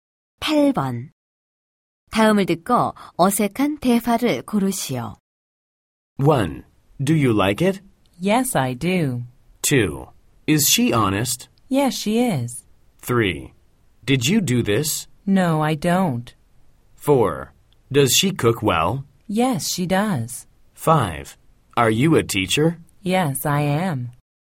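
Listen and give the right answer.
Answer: 3: Did you do this? No, I don't.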